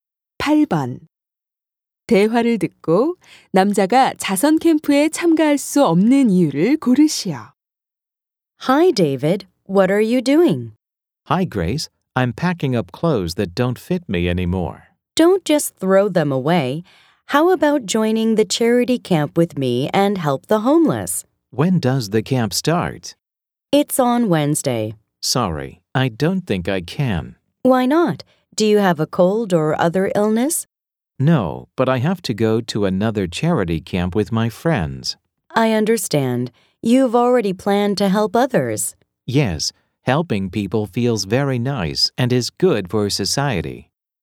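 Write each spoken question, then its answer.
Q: 대화를 듣고 남자가 자선 캠프에 참가할 수 없는 이유를 고르시오.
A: 친구들과 다른 자선 캠프에 가야 해서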